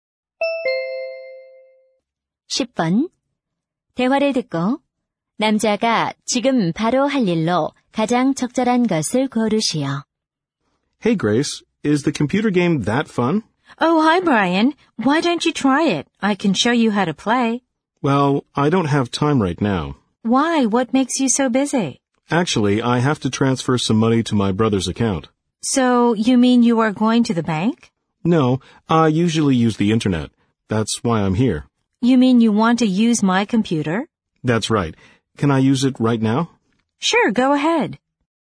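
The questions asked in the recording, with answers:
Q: 대화를 듣고 남자가 지금 바로 할 일로 가장 적절한 것을 고르시오.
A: 인터넷으로 동생 계좌에 송금하기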